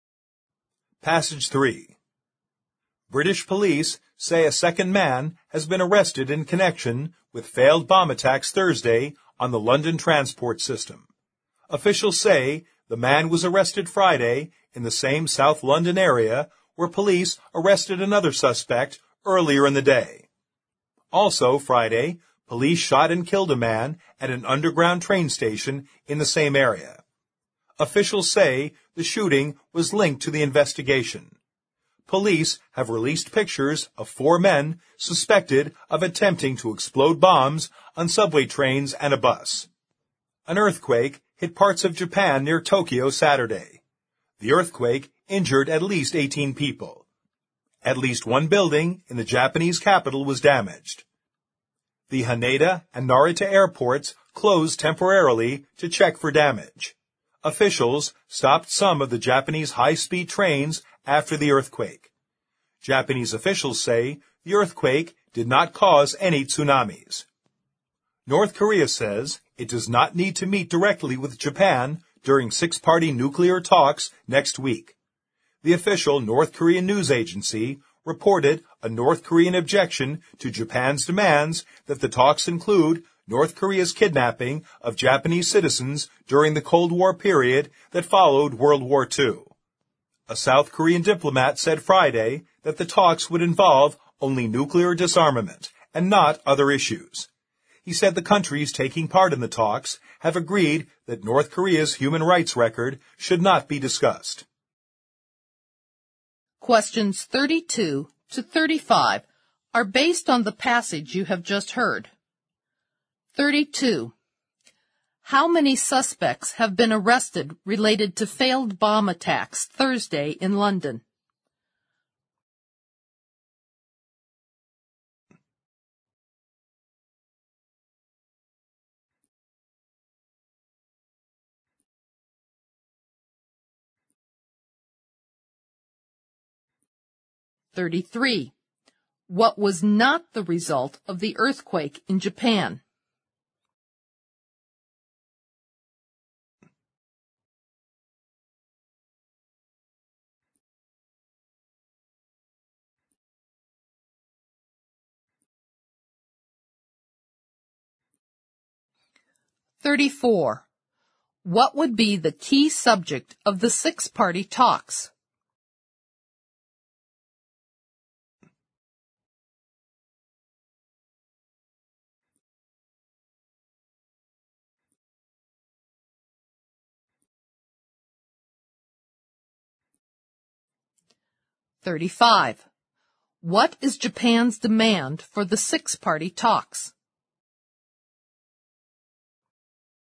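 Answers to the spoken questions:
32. 2.
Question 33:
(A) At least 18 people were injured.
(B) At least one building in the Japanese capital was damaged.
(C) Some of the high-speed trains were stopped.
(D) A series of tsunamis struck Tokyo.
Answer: (D) A series of tsunamis struck Tokyo.
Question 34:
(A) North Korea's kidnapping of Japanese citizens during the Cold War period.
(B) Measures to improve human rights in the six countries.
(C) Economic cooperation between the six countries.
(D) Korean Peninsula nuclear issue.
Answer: (D) Korean Peninsula nuclear issue.
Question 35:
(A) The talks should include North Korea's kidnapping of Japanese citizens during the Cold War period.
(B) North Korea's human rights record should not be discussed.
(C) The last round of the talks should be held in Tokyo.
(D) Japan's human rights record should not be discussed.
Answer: (A) The talks should include North Korea's kidnapping of Japanese citizens during the Cold War period.

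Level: 四级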